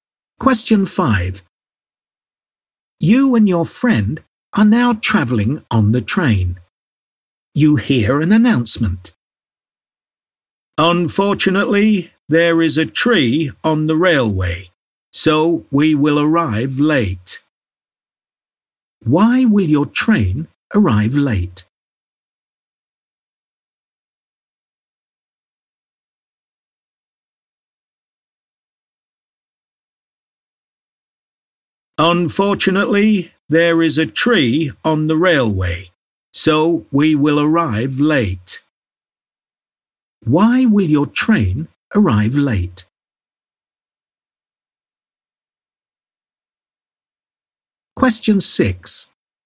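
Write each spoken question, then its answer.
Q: Why will your train arrive late?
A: There is a tree on the railway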